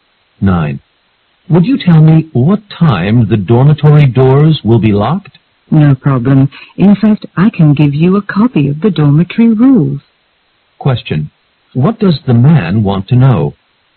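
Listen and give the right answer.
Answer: What time the dormitory doors will be locked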